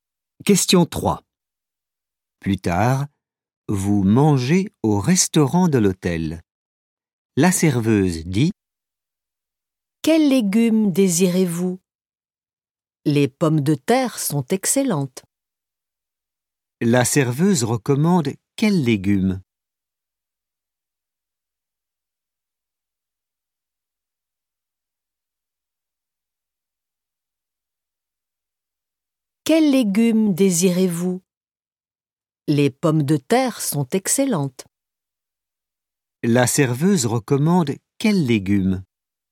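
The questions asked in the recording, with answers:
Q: La serveuse recommande quels légumes?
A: Les pommes de terre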